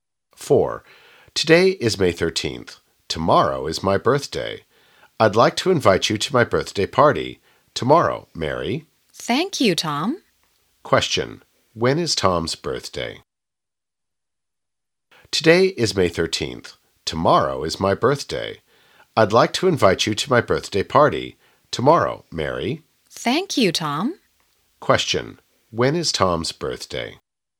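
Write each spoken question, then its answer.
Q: Question. When is Tom's birthday?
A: May 14th.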